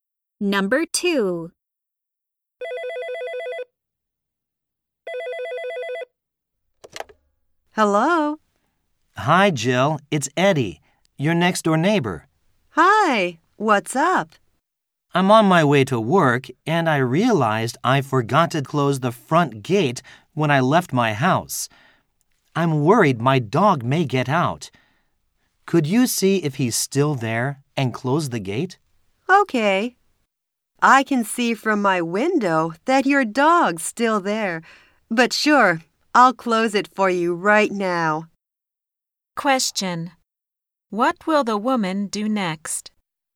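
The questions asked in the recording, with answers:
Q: What will the woman do next?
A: Close the front gate of Eddie's house.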